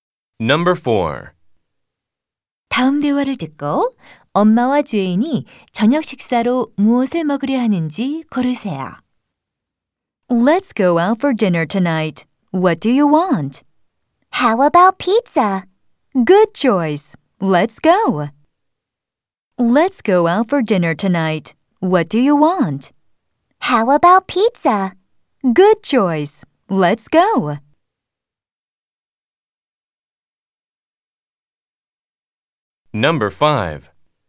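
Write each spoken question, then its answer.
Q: 다음 대화를 듣고 엄마와 제인이 저녁 식사로 무엇을 먹으려 하는지 고르세요.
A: 피자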